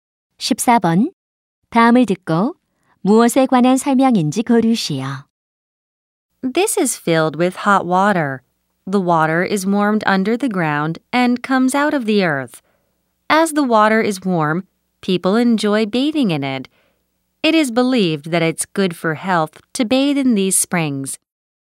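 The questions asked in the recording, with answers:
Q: 다음을 듣고 무엇에 관한 설명인지 고르시오.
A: 온천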